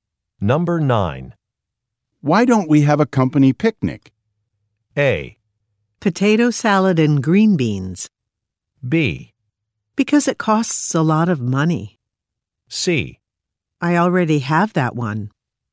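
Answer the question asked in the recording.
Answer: B: Because it costs a lot of money.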